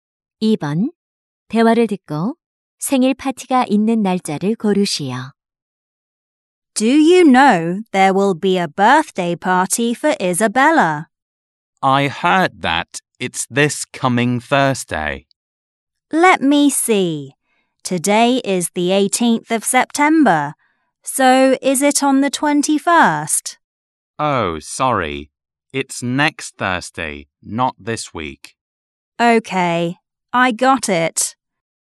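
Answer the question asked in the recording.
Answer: 9월 28일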